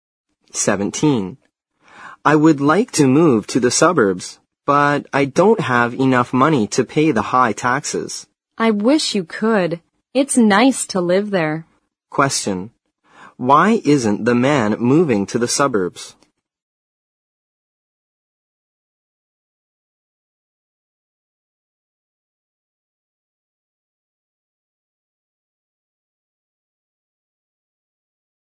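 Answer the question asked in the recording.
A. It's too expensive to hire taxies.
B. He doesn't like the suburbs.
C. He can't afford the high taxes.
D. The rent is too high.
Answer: C. He can't afford the high taxes.

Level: 新编四级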